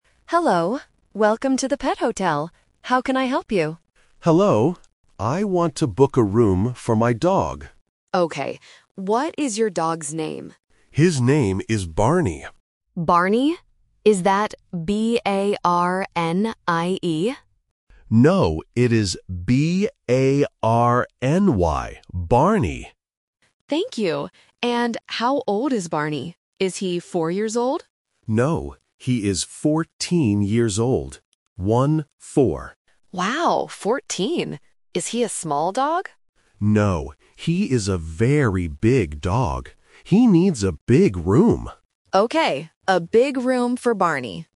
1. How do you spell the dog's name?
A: B-A-R-N-Y

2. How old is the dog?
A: 14 years old

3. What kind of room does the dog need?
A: A big room